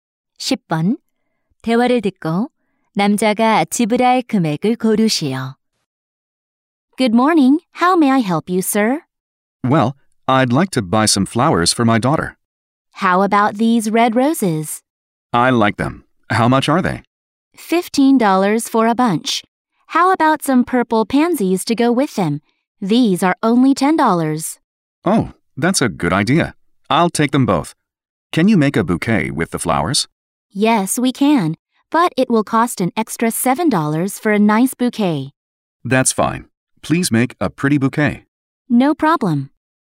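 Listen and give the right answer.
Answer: 32달러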